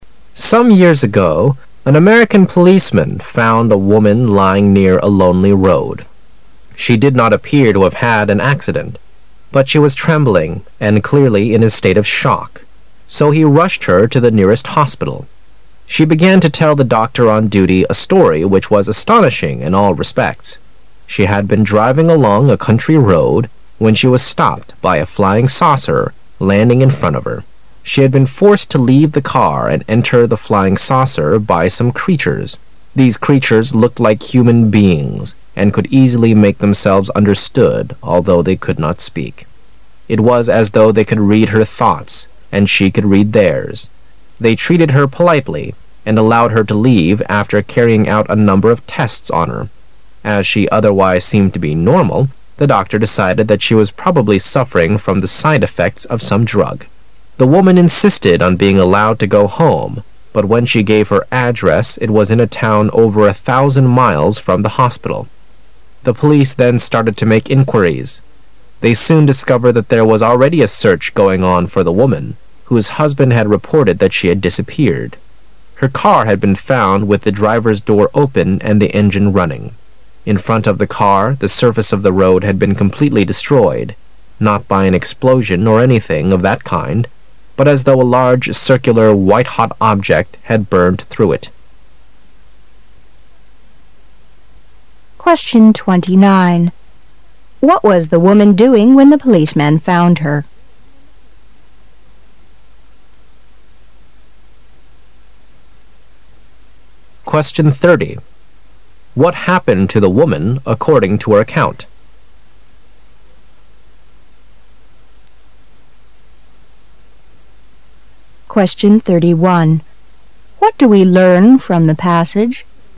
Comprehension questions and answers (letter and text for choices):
What happened to the woman according to her account?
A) She was forced to enter a flying saucer.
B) She was robbed by some creatures.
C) She was stopped by a policeman.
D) She fainted because of the side-effects of some drug.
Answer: A) She was forced to enter a flying saucer.

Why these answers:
事实细节题。文章首段最后一句提到"She had been forced to leave the car and enter the flying saucer by some creatures."(她被一些怪物强迫离开汽车,进入飞碟。)由此可知,A)项为正确答案。

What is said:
[解析] 29-31 Some years ago an American policeman found a woman lying near a lonely road.She did not appear to have had an accident, but she was trembling and clearly in a state of shock, so he rushed her to the nearest hospital. She began to tell the doctor on duty a story which was astonishing in all respects. She had been driving along a country road when she was stopped by a flying saucer landing in front of her. She had been forced to leave the car and enter the flying saucer by some creatures. These creatures looked like human beings, and could easily make themselves understood although they could not speak. It was as though they could read her thoughts and she could read theirs. They treated her politely and allowed her to leave after carrying out a number of tests on her. As she otherwise seemed to be normal, the doctor decided that she was probably suffering from the side-effects of some drug. The woman insisted on being allowed to go home, but when she gave her address it was in a town over a thousand miles from the hospital. The police then started to make inquiries. They soon discovered that there was already a search going on for the woman, whose husband had reported that she had disappeared. Her car had been found with the driver's door open and the engine running. In front of the car the surface of the road had b~n completely destroyed--not by an explosion or anything of that kind, but as though a large, circular, white-hot object had burnt through it. What was the woman doing when the policeman found her?